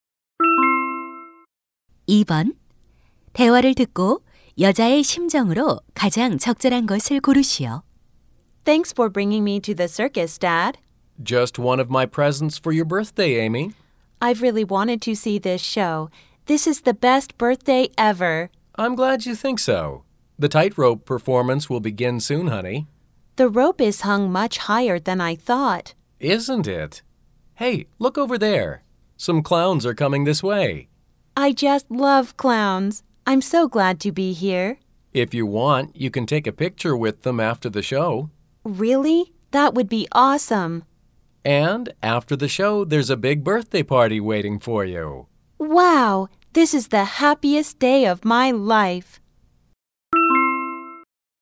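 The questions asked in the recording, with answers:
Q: 대화를 듣고 여자의 심정으로 가장 적절한 것을 고르시오.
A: 기쁘고 신남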